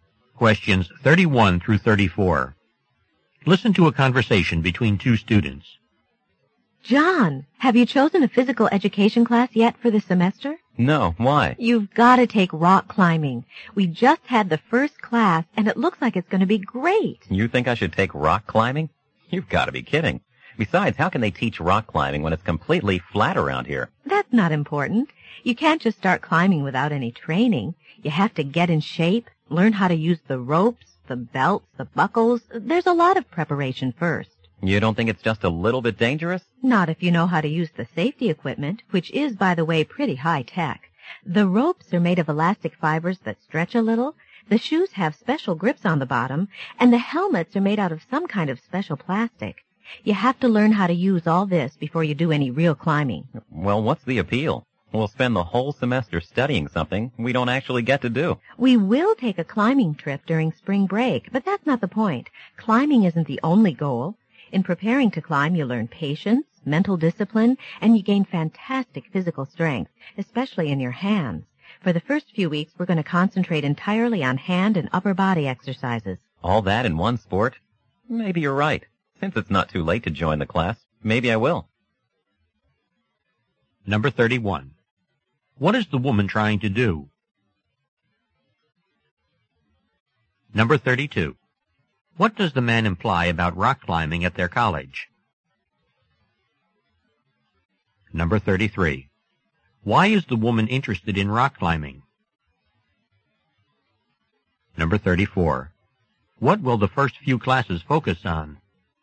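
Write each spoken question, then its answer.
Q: What is the woman trying to do?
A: Persuade the man to take a rock climbing class

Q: What does the man imply about rock climbing at their college?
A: The area is too flat for it

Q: Why is the woman interested in rock climbing?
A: It builds patience, mental discipline and physical strength

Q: What will the first few classes focus on?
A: Hand and upper body exercises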